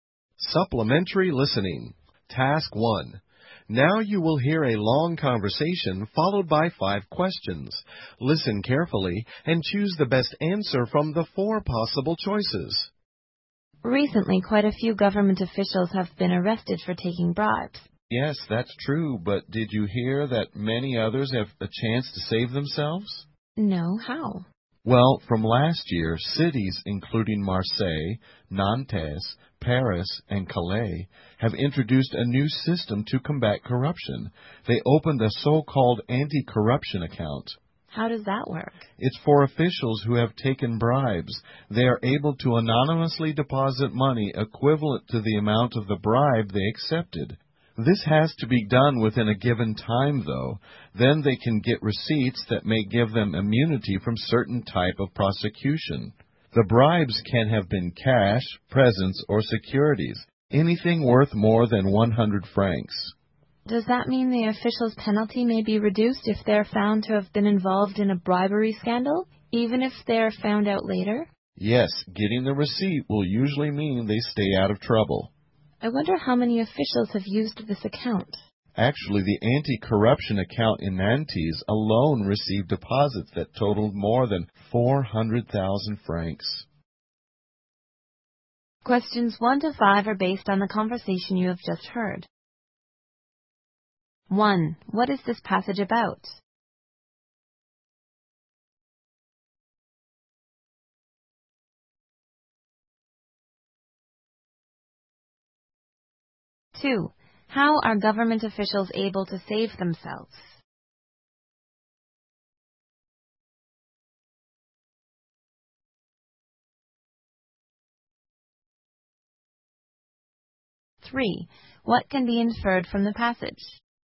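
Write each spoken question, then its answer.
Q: How are government officials able to save themselves?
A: By anonymously depositing money equal to the bribe into an anti-corruption account within a given time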